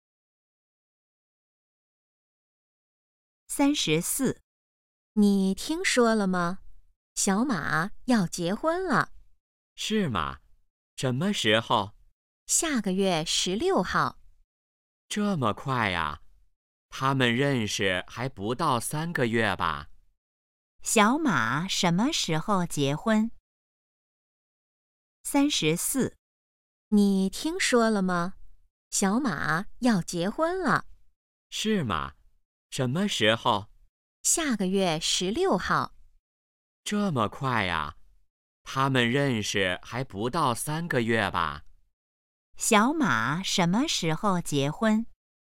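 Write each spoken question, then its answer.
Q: 小马什么时候结婚?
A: 下个月16号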